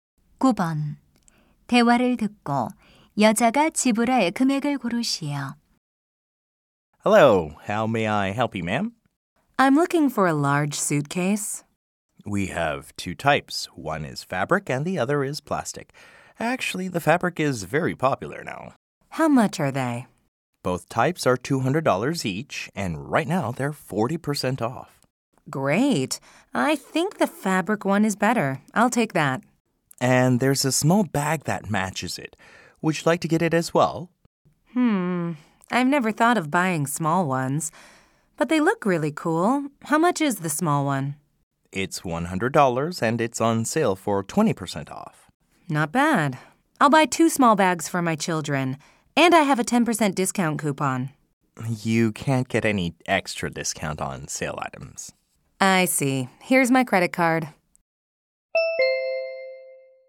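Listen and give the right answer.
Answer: $280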